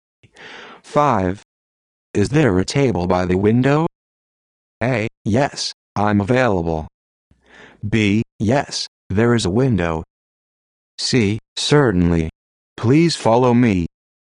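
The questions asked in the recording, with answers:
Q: Is there a table by the window?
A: C: Certainly. Please follow me.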